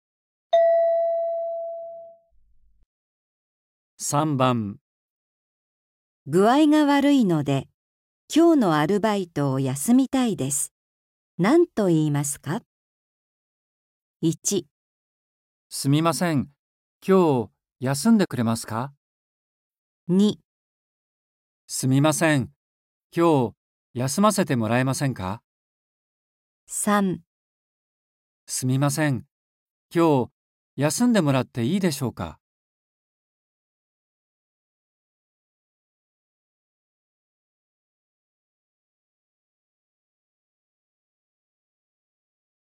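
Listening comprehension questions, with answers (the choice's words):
具合が悪いので、今日のアルバイトを休みたいです。何と言いますか。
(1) すみません。今日、休んでくれますか。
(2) すみません。今日、休ませてもらえませんか。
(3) すみません。今日、休んでもらっていいでしょうか。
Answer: すみません。今日、休ませてもらえませんか。

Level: N4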